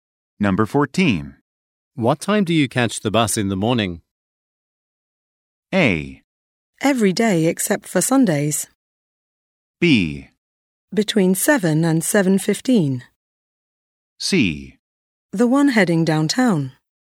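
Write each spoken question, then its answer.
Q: What time do you catch the bus in the morning?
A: B: Between 7 and 7:15.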